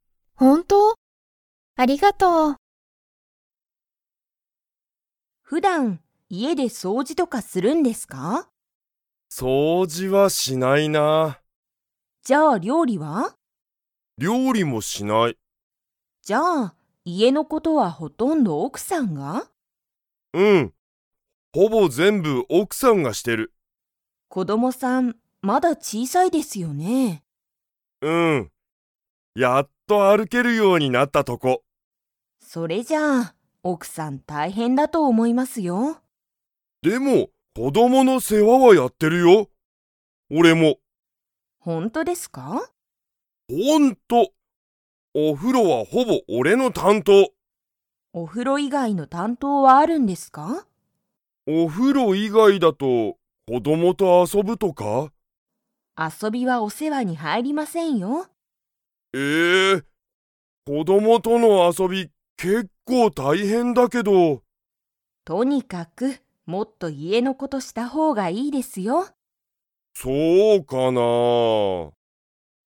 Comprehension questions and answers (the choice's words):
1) 普段ふだん、田中たなかさんは家いえで料理りょうりをしますか?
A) はい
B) いいえ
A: いいえ

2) はほぼ田中たなかさんの担当たんとうだ。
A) 掃除そうじ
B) お風呂ふろ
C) 家いえの事こと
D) 奥おくさん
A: お風呂ふろ

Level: Level 4